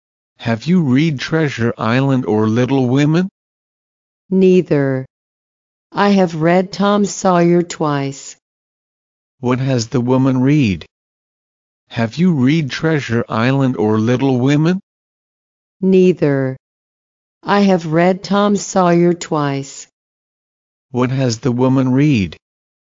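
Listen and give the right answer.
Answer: Tom Sawyer.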